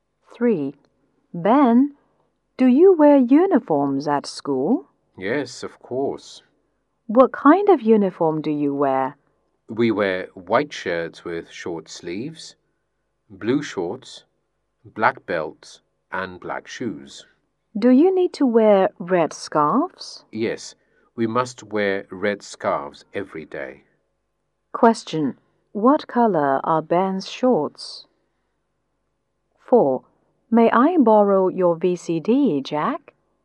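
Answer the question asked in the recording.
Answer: Blue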